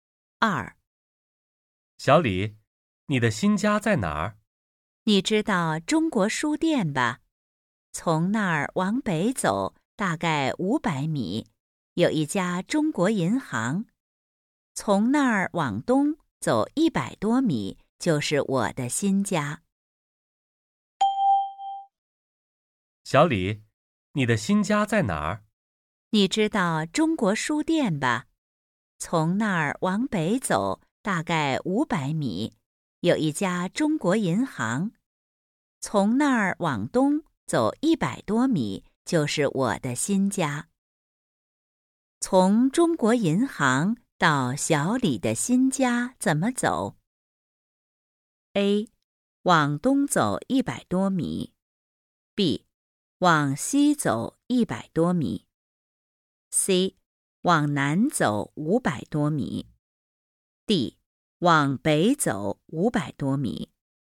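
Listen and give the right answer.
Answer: A: 往东走100多米。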